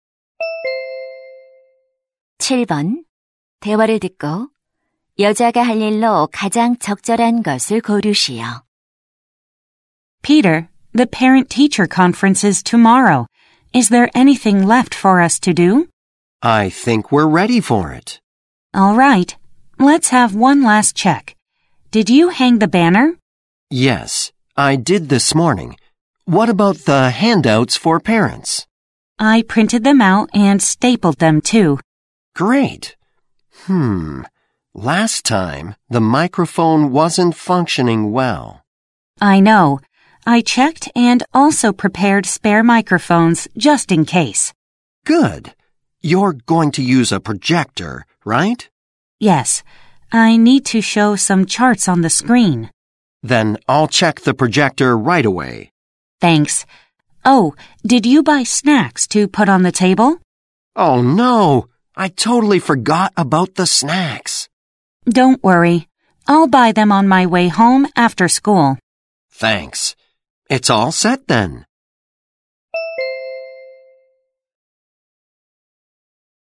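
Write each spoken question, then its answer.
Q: 대화를 듣고 여자가 할 일로 가장 적절한 것을 고르시오.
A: 간식 사 오기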